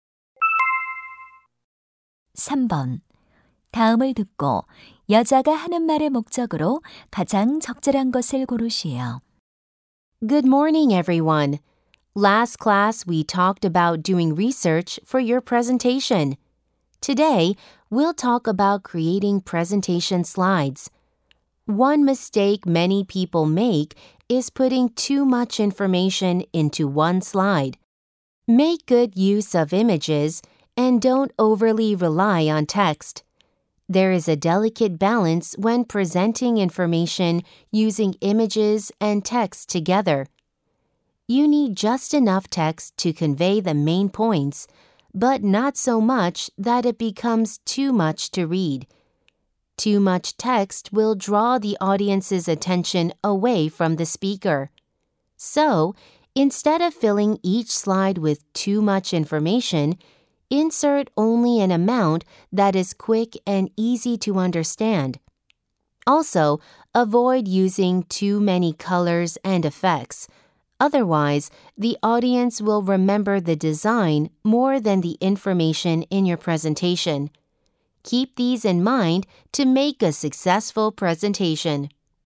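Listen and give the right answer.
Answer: 효과적인 발표 슬라이드 작성 방법을 조언하려고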